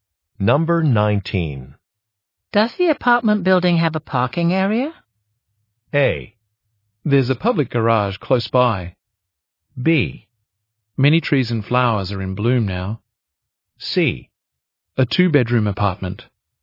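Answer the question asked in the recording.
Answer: A: There's a public garage close by.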